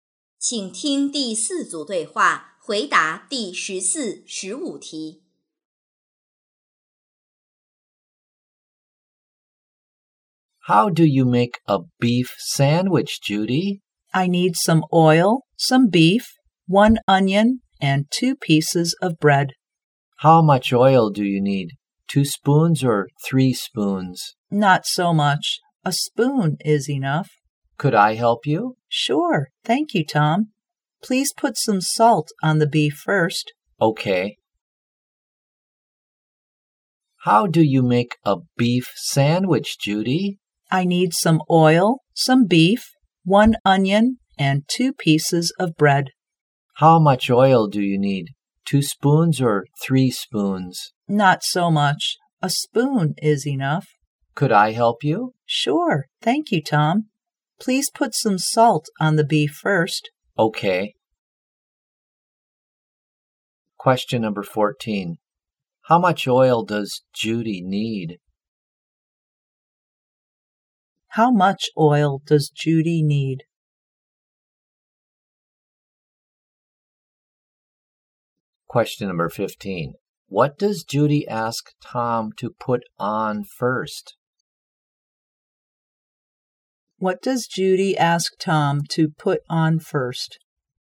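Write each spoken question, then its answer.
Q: How much oil does Judy need?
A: One spoon

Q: What does Judy ask Tom to put on first?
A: Salt (on the beef)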